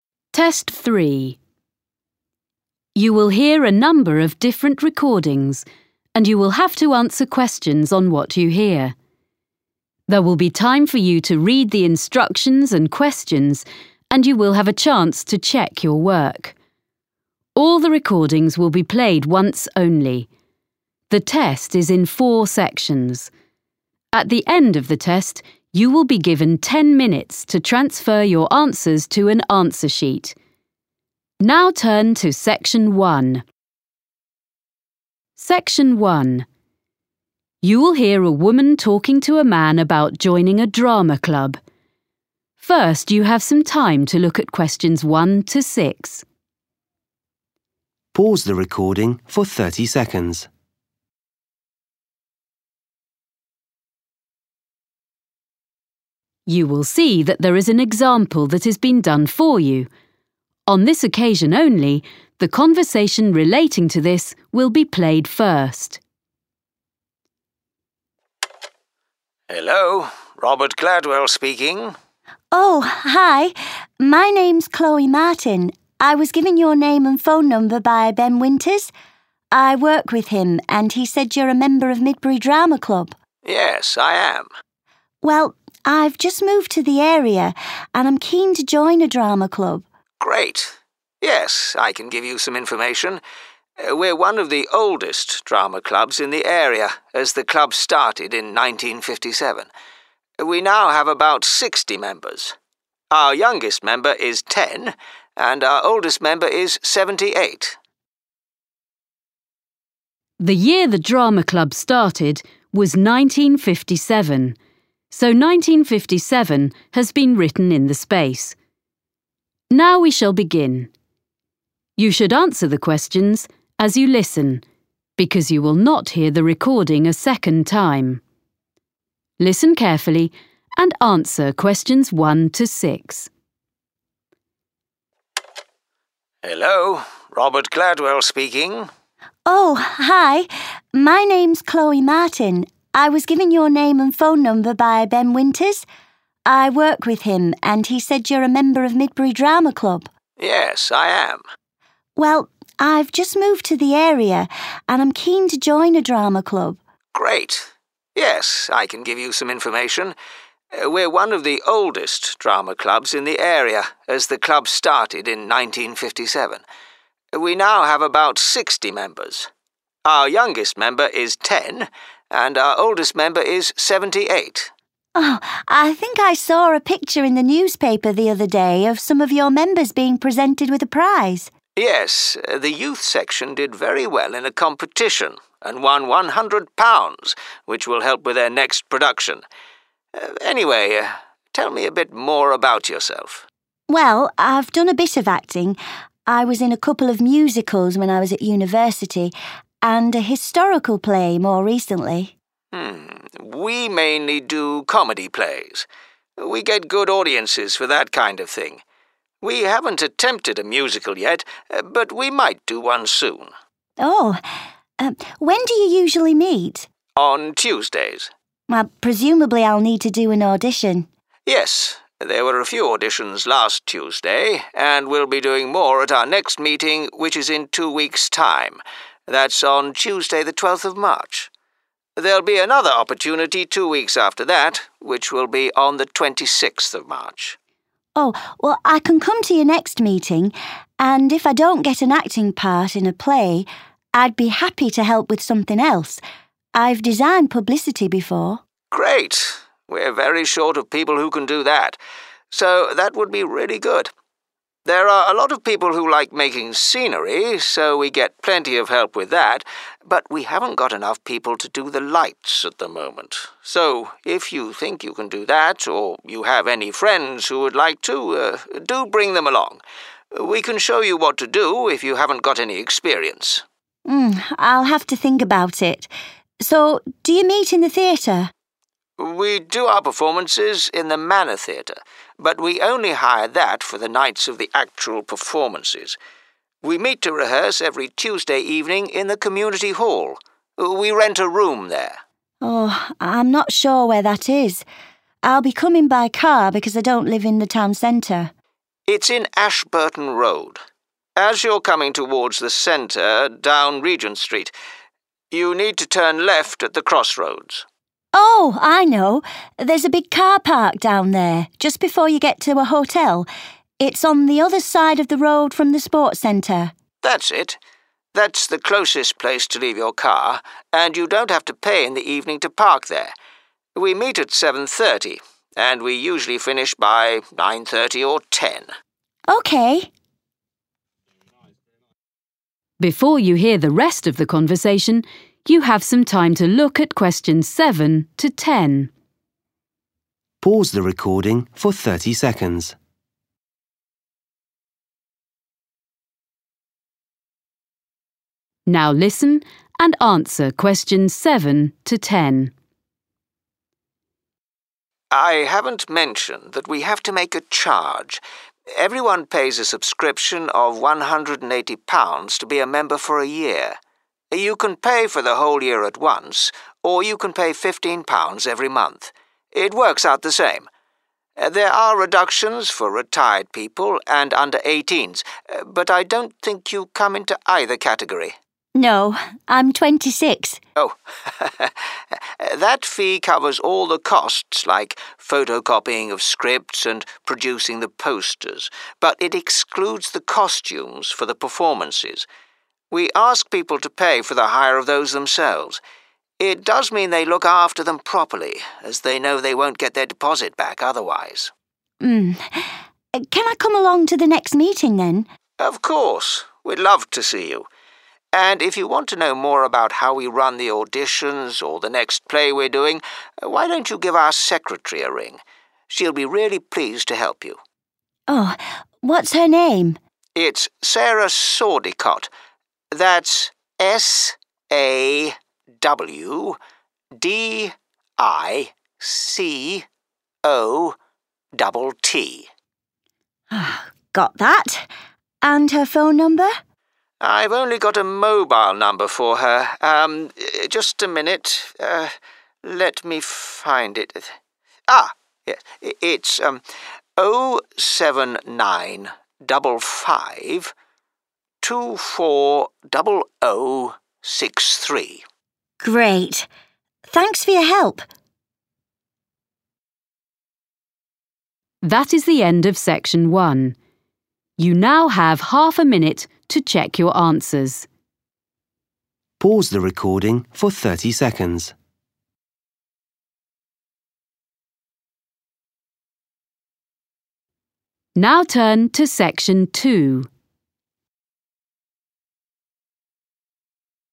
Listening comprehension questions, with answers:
Questions 1-10. Complete the notes below. Write NO MORE THAN TWO WORDS AND/OR A NUMBER for each answer.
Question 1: – prize recently won by 1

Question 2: – usually performs 2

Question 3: – next auditions will be on Tuesday, 3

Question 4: – help is needed with 4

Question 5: – rehearsals take place in the 5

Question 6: – nearest car park for rehearsals is in Ashburton Road opposite the 6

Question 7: – annual membership fee is £ 7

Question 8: – extra payment for 8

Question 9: – secretary's name is Sarah 9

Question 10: – secretary's phone number is 10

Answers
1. youth
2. comedy
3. 12th March
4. publicity
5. community
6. sports center
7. 180
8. costumes
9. Sawdicott
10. 07955240063

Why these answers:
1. Yes, the youth section did very well in a competition and won £100 which will help with their next production. (Vâng, đoàn thanh thiếu niên đã làm rất tốt trong một cuộc thi và giành được 100 bảng Anh, số tiền này sẽ giúp ích cho sản phẩm tiếp theo của họ)
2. Mm ... we mainly do (=usually perform) comedy plays. We get good audiences for that kind of thing. (Mm... chúng tôi chủ yếu đóng kịch hài. Chúng tôi có được lượng khán giả tốt cho mục đó).
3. Yes, there were a few auditions last Tuesday and we'll be doing more at our next meeting which is in two weeks' time, that's on Tuesday the 12th of March. (Vâng, đã có một vài buổi thử giọng vào thứ ba tuần trước và chúng tôi sẽ làm nhiều hơn trong cuộc họp tiếp theo của chúng tôi trong thời gian hai tuần nữa, tức là vào thứ ba ngày 12 tháng ba).
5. We meet to rehearse every Tuesday evening in the community hall. (Chúng tôi gặp nhau để diễn tập vào mỗi tối thứ Ba tại hội trường cộng đồng).